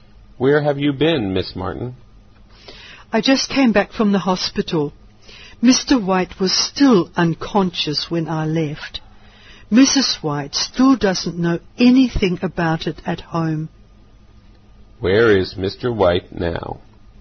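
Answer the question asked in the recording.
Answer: In the hospital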